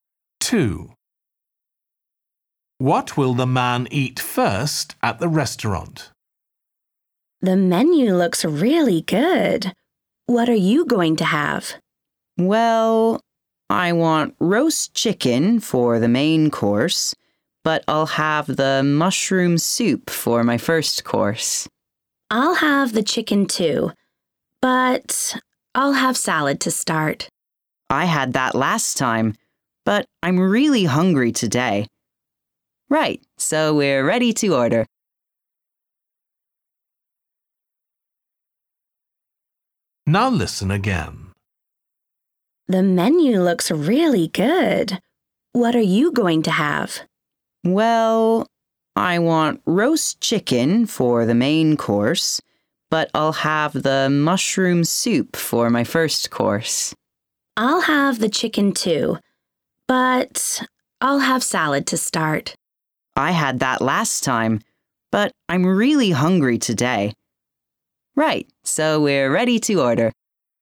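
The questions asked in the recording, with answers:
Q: What will the man eat first at the restaurant?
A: Mushroom soup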